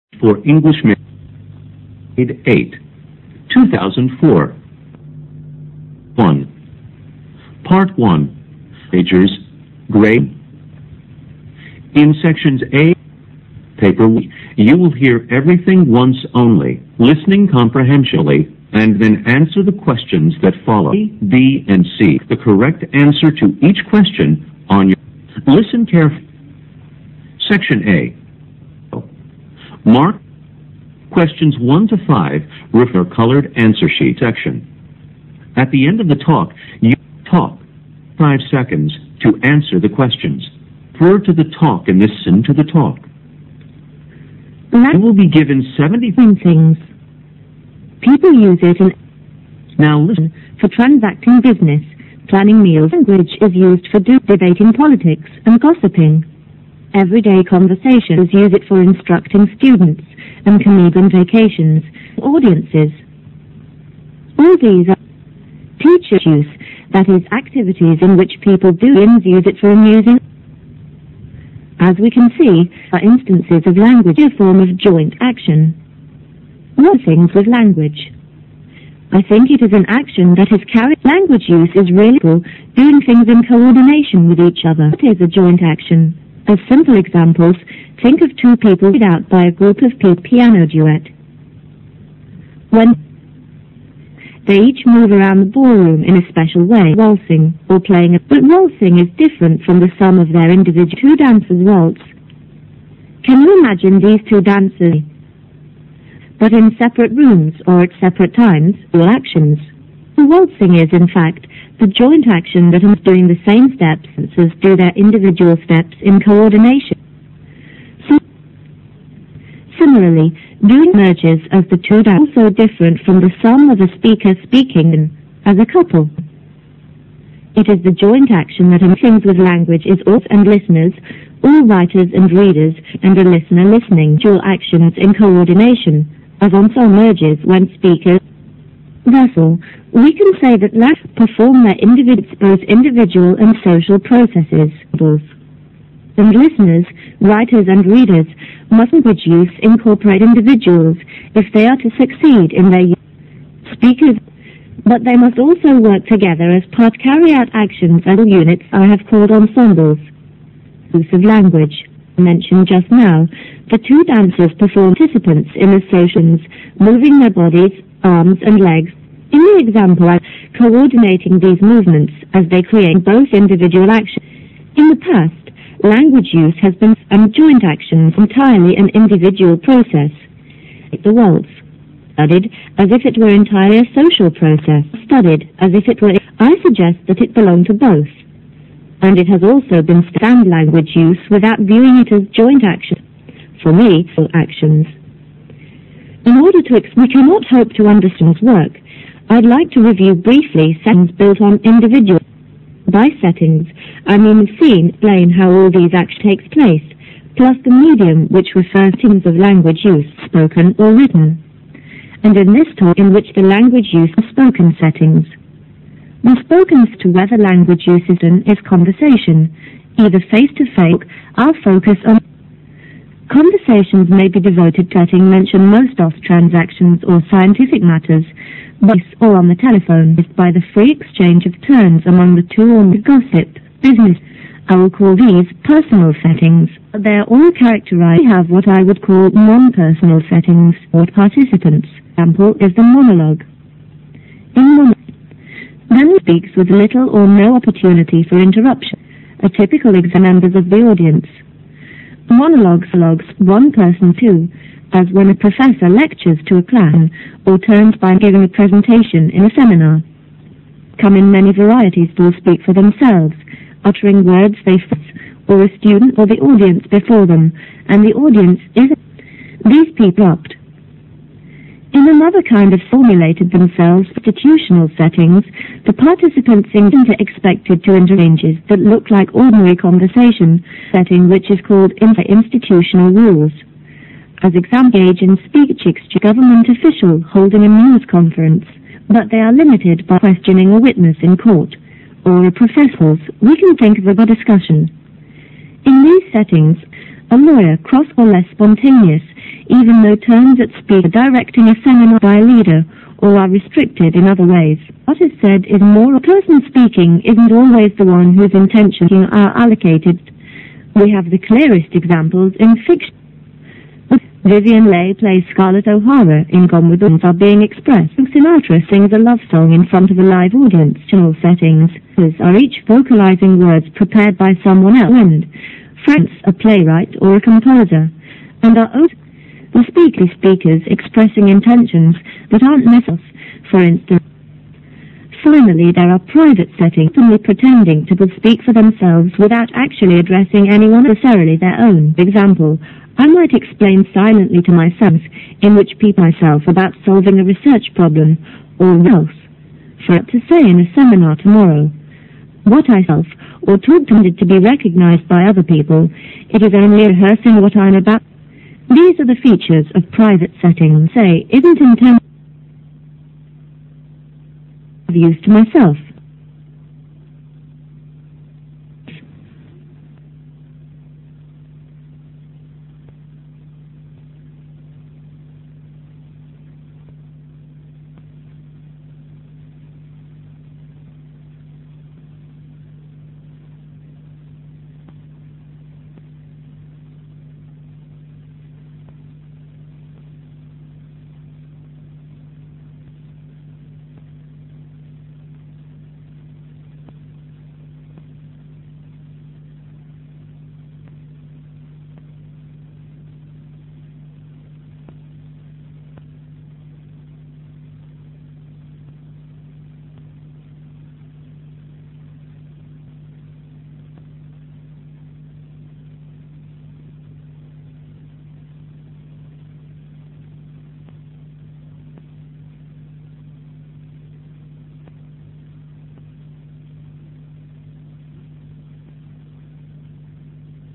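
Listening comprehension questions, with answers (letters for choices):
Questions 1 to 5 refer to the talk in this section. At the end of the talk you will be given 75 seconds to answer the questions. Now listen to the talk.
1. The parallel between waltzing and language use lies in ____.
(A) the coordination based on individual actions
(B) the number of individual participants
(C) the necessity of individual actions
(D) the requirements for participants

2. In the talk the speaker thinks that language use is a(n) ____ process.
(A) individual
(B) combined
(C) distinct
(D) social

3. The main difference between personal and non-personal settings is in ____.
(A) the manner of language use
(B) the topic and content of speech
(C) the interactions between speaker and audience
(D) the relationship between speaker and audience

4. In fictional settings, speakers ____.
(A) hide their real intentions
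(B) voice others' intentions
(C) play double roles on and off stage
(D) only imitate other people in life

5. Compared with other types of settings, the main feature of private setting is ____.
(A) the absence of spontaneity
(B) the presence of individual actions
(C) the lack of real intentions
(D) the absence of audience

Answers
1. A
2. B
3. C
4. B
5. D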